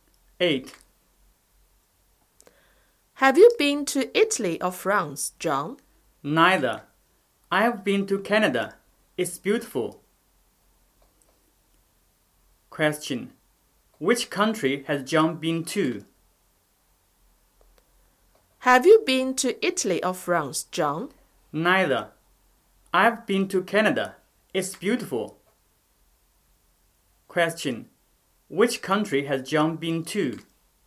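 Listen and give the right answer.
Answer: Canada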